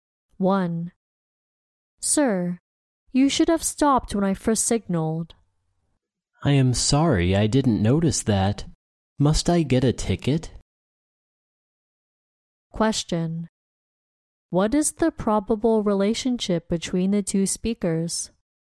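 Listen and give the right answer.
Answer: Policeman and driver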